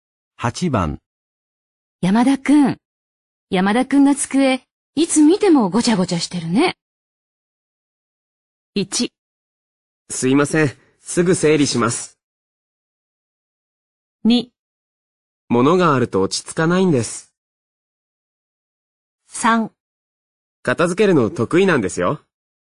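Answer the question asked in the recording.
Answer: 1: すいません、すぐ整理します。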